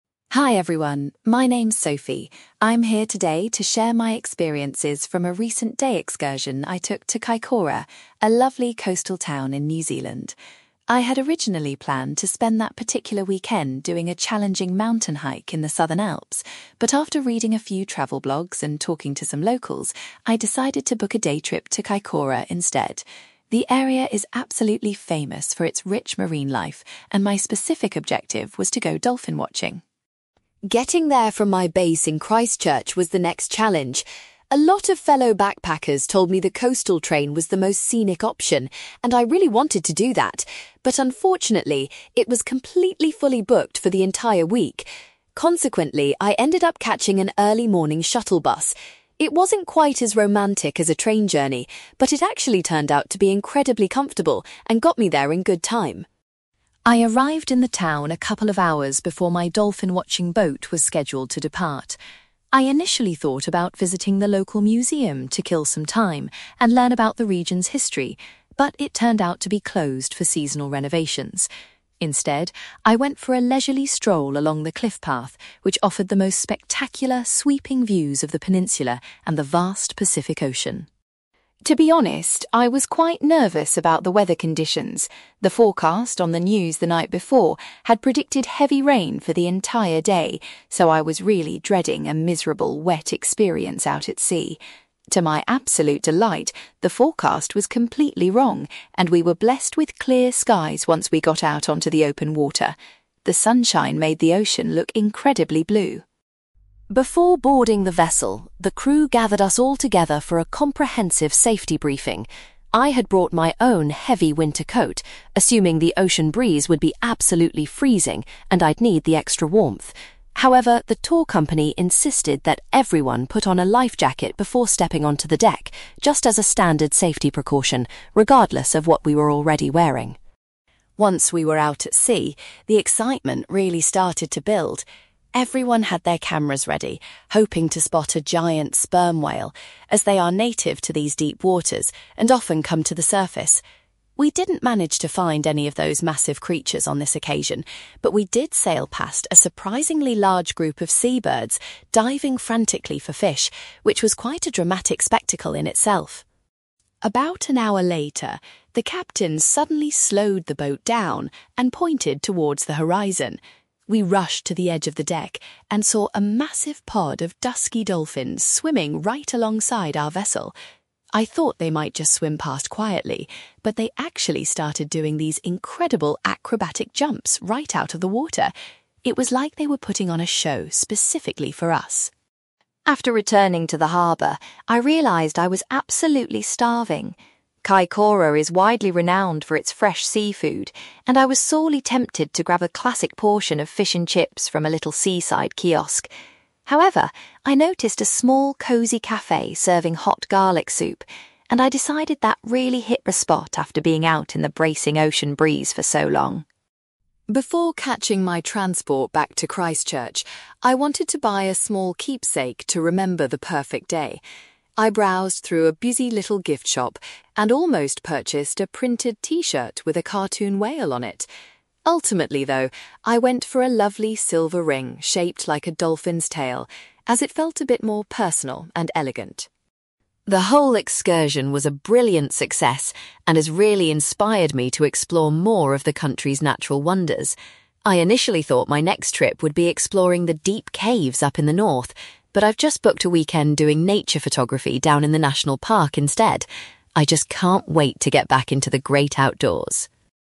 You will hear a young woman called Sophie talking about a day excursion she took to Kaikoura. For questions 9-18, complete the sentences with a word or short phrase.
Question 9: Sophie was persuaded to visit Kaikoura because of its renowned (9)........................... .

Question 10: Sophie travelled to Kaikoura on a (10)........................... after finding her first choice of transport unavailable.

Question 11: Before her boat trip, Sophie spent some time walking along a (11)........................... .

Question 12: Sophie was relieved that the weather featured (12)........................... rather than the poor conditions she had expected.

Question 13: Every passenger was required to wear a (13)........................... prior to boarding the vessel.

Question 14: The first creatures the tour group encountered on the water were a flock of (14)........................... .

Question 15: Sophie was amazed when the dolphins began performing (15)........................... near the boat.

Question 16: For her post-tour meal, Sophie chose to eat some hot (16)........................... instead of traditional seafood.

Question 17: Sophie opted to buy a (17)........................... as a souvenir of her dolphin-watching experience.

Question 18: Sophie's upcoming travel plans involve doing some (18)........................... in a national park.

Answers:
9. marine life
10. shuttle bus
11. cliff path
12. clear skies
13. life jacket
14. sea birds
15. acrobatic jumps
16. garlic soup
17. silver ring
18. nature photography

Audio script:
I'm here today to share my experiences from a recent day excursion I took to Kaikoura, a lovely coastal town in New Zealand. I had originally planned to spend that particular weekend doing a challenging mountain hike in the Southern Alps, but after reading a few travel blogs and talking to some locals, I decided to book a day trip to Kaikoura instead. The area is absolutely famous for its rich marine life, and my specific objective was to go dolphin-watching.
Getting there from my base in Christchurch was the next challenge. A lot of fellow backpackers told me the coastal train was the most scenic option, and I really wanted to do that, but unfortunately, it was completely fully booked for the entire week. Consequently, I ended up catching an early morning shuttle bus. It wasn't quite as romantic as a train journey, but it actually turned out to be incredibly comfortable and got me there in good time.
I arrived in the town a couple of hours before my dolphin-watching boat was scheduled to depart. I initially thought about visiting the local museum to kill some time and learn about the region's history, but it turned out to be closed for seasonal renovations. Instead, I went for a leisurely stroll along the cliff path, which offered the most spectacular, sweeping views of the peninsula and the vast Pacific Ocean.
To be honest, I was quite nervous about the weather conditions. The forecast on the news the night before had predicted heavy rain for the entire day, so I was really dreading a miserable, wet experience out at sea. To my absolute delight, the forecast was completely wrong, and we were blessed with clear skies once we got out onto the open water. The sunshine made the ocean look incredibly blue.
Before boarding the vessel, the crew gathered us all together for a comprehensive safety briefing. I had brought my own heavy winter coat, assuming the ocean breeze would be absolutely freezing and I'd need the extra warmth. However, the tour company insisted that everyone put on a life jacket before stepping onto the deck, just as a standard safety precaution regardless of what we were already wearing.
Once we were out at sea, the excitement really started to build. Everyone had their cameras ready, hoping to spot a giant sperm whale, as they are native to these deep waters and often come to the surface. We didn't manage to find any of those massive creatures on this occasion, but we did sail past a surprisingly large group of sea birds diving frantically for fish, which was quite a dramatic spectacle in itself.
About an hour later, the captain suddenly slowed the boat down and pointed towards the horizon. We rushed to the edge of the deck and saw a massive pod of dusky dolphins swimming right alongside our vessel. I thought they might just swim past quietly, but they actually started doing these incredible acrobatic jumps right out of the water! It was like they were putting on a show specifically for us.
After returning to the harbour, I realised I was absolutely starving. Kaikoura is widely renowned for its fresh seafood, and I was sorely tempted to grab a classic portion of fish and chips from a little seaside kiosk. However, I noticed a small, cosy cafe serving hot garlic soup, and I decided that really hit the spot after being out in the bracing ocean breeze for so long.
Before catching my transport back to Christchurch, I wanted to buy a small keepsake to remember the perfect day. I browsed through a busy little gift shop and almost purchased a printed t-shirt with a cartoon whale on it. Ultimately though, I went for a lovely silver ring shaped like a dolphin's tail, as it felt a bit more personal and elegant.
The whole excursion was a brilliant success and has really inspired me to explore more of the country's natural wonders. I initially thought my next trip would be exploring the deep caves up in the north, but I've just booked a weekend doing nature photography down in the national park instead. I just can't wait to get back into the great outdoors!

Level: B2